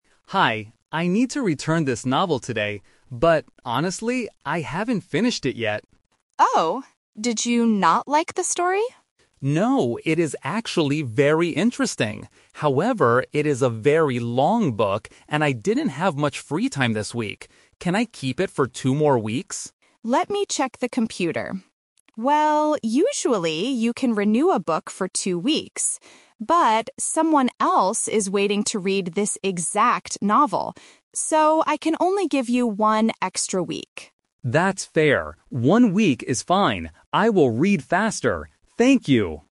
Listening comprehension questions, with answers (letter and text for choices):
Listen to a conversation between a borrower and a librarian. Choose the correct answer A, B, or C.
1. Why hasn't the man finished reading the novel?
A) Because he didn't like the story.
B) Because the book is very long.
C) Because he lost the book.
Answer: B) Because the book is very long.

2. How much extra time did the man ask for at first?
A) One week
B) Two weeks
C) Three weeks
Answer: B) Two weeks

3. How long can the man actually keep the book?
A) He must return it today.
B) For two more weeks.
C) For one extra week.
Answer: C) For one extra week.

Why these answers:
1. The man says, "it is a very long book, and I didn't have much free time". Trap: Option A is a trap. The librarian asks "Did you not like the story?", but the man says "No, it is actually very interesting!"
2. The man asks, "Can I keep it for two more weeks?" Trap: Option A (One week) is a trap because it is the final result, not what he asked for at first.
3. The librarian says, "So, I can only give you one extra week," and the man agrees. Trap: Option B (Two weeks) is a trap. It is what the man wanted, and what the library "usually" allows, but not what happens this time. Option A is what he planned to do originally before asking for more time.

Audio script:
Man: Hi, I need to return this novel today. But, honestly, I haven't finished it yet.
Librarian: Oh? Did you not like the story?
Man: No, it is actually very interesting! However, it is a very long book, and I didn't have much free time this week. Can I keep it for two more weeks?
Librarian: Let me check the computer. Well, usually you can renew a book for two weeks. But, someone else is waiting to read this exact novel. So, I can only give you one extra week.